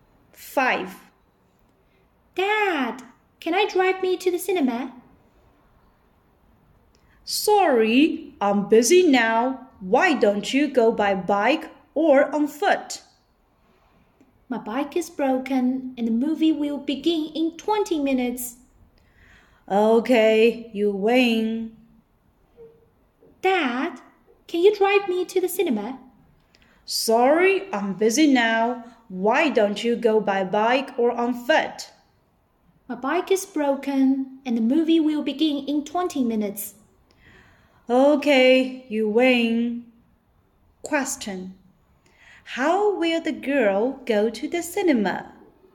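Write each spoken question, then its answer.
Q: Question. How will the girl go to the cinema?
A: By car (her dad will drive her)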